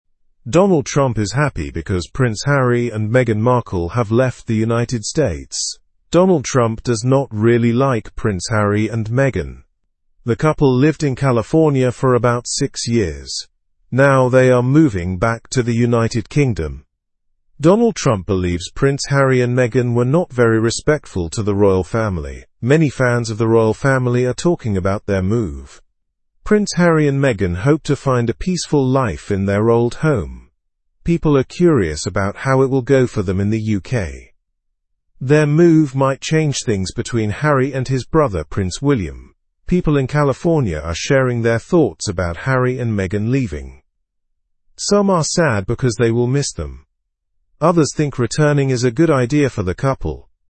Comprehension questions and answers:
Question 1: How long did Prince Harry and Meghan live in California?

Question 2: How does Donald Trump feel about the couple leaving the United States?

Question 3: Where are Prince Harry and Meghan moving back to?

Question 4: What do Prince Harry and Meghan hope to find in the UK?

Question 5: How might the move affect Prince Harry's family relationships?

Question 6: How do people in California feel about the couple's move?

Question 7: Why are people interested in Prince Harry and Meghan's move?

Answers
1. They lived in California for six years.
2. Donald Trump feels happy about it.
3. They are moving back to the United Kingdom.
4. They hope to find a peaceful new life.
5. It might change the relationship with Prince William.
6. Some people are sad, while others think it is best for them.
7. People are curious about how their return to the UK will go.

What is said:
Donald Trump is happy because Prince Harry and Meghan Markle have left the United States. Donald Trump does not really like Prince Harry and Meghan. The couple lived in California for about six years. Now, they are moving back to the United Kingdom.
Donald Trump believes Prince Harry and Meghan were not very respectful to the Royal Family. Many fans of the Royal Family are talking about their move. Prince Harry and Meghan hope to find a peaceful life in their old home. People are curious about how it will go for them in the UK.
Their move might change things between Harry and his brother, Prince William. People in California are sharing their thoughts about Harry and Meghan leaving. Some are sad because they will miss them. Others think returning is a good idea for the couple.

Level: (Level 2)